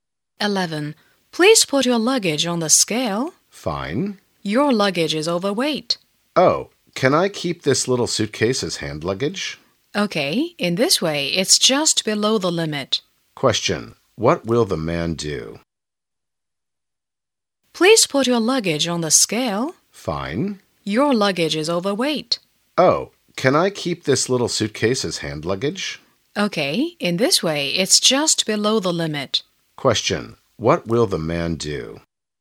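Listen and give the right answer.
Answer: Keep the little suitcase as hand luggage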